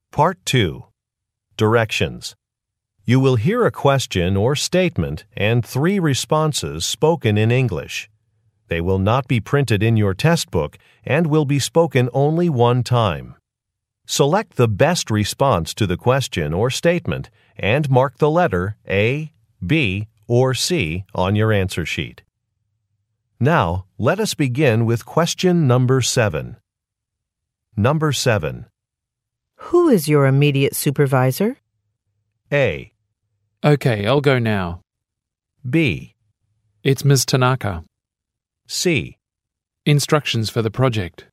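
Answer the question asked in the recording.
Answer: It's Ms. Tanaka.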